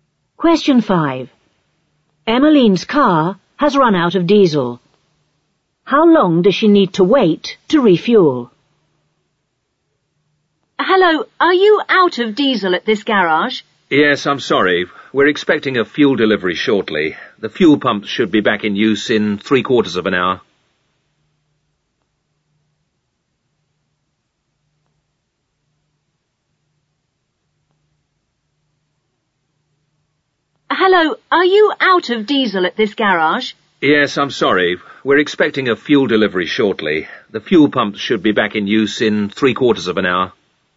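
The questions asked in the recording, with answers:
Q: How long does she need to wait to refuel?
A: Three quarters of an hour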